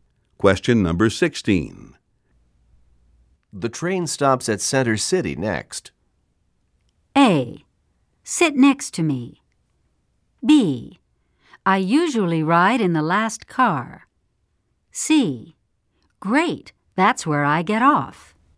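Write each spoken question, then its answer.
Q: The train stops at Center City next.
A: C: Great, that's where I get off.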